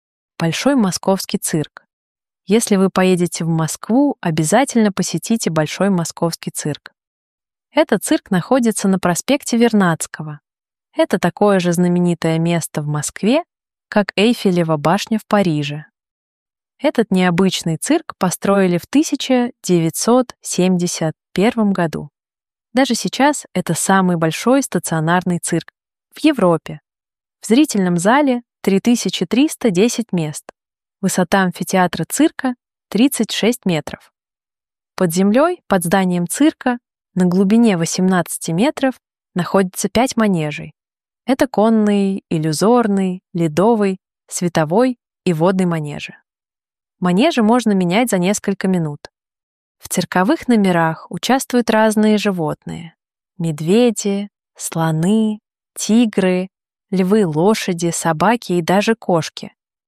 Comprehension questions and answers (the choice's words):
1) Если вы ................................................ (будете ездить / будете ехать / поедете)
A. будете ездить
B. будете ехать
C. поедете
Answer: поедете

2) Этот цирк ................................................... (находиться / находится) на проспекте Вернадского.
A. находиться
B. находится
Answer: находится

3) Этот необычный цирк ...................................................... (построил / построили)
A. построил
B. построили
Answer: построили

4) в ....................................... (1971-ого года / 1971-ом году).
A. 1971-ого года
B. 1971-ом году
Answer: 1971-ом году

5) В зрительном зале 3310 ........................................ (мест / места).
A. мест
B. места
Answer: мест

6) Высота амфитеатра цирка 36 ................................. етр / метров).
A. етр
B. метров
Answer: метров

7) Это конный, иллюзорный, ледовый, световой и водный ............................................. (манежей / манежи).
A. манежей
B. манежи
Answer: манежи

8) Манежи можно менять за несколько.................................. (минут / минуту).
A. минут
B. минуту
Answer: минут

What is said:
Большой Московский цирк
Большой Московский цирк
Если вы поедете в Москву, обязательно посетите Большой Московский цирк.
Этот цирк находится на проспекте Вернадского.
Это такое же знаменитое место в Москве, как Эйфелева башня в Париже.
Этот необычный цирк построили в 1971-ом году.
Даже сейчас это самый большой стационарный цирк в Европе.
В зрительном зале 3310 мест.
Высота амфитеатра цирка 36 метров.
Под землёй под зданием цирка на глубине 18-ти метров находится 5 манежей.
Это конный, иллюзорный, ледовый, световой и водный манежи.
Манежи можно менять за несколько минут.
В цирковых номерах участвуют разные животные: медведи, слоны, тигры, львы, лошади, собаки и даже кошки.

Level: niveau débutant A2